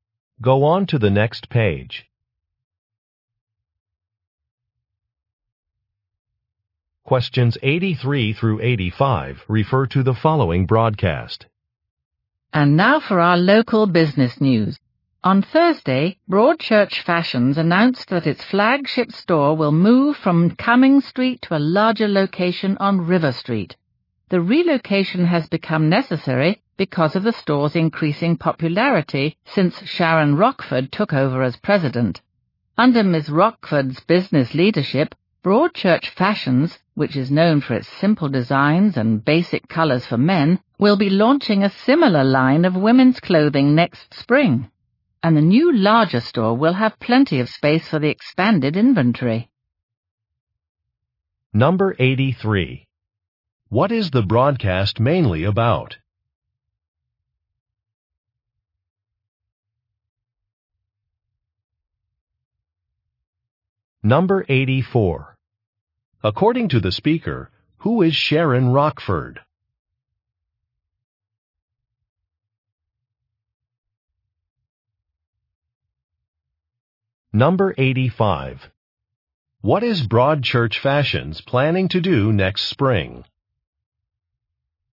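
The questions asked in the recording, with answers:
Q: What is the broadcast mainly about?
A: A store relocating to a larger location

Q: According to the speaker, who is Sharon Rockford?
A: The president of Broadchurch Fashions

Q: What is Broadchurch Fashions planning to do next spring?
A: Launch a line of women's clothing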